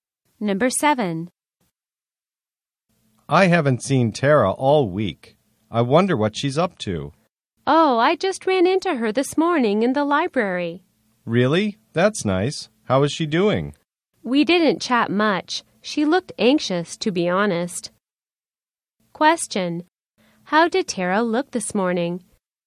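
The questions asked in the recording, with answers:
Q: How did Tara look this morning?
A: Anxious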